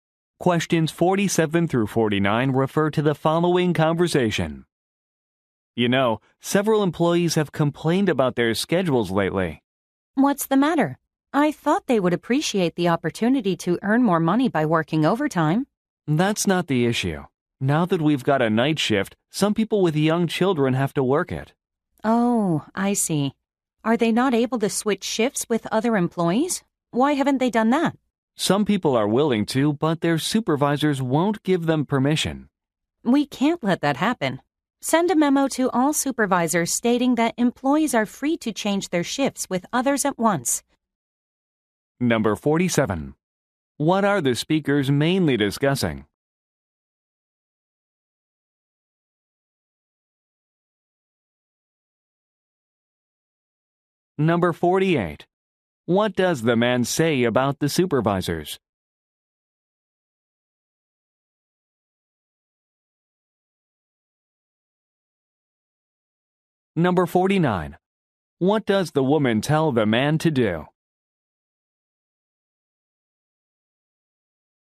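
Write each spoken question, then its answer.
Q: What are the speakers mainly discussing?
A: Employees' complaints about schedules

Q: What does the man say about the supervisors?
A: They won't let employees switch shifts

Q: What does the woman tell the man to do?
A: Send a memo to all supervisors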